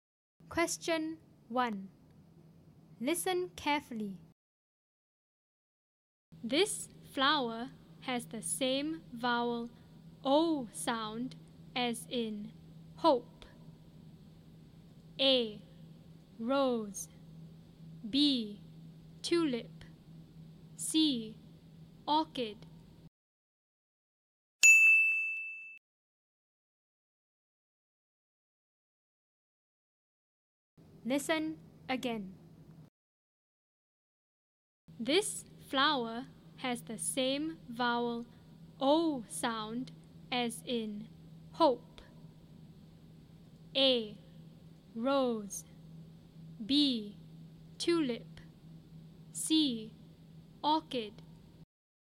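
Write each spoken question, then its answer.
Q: This flower has the same vowel O sound as in hope.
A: A: Rose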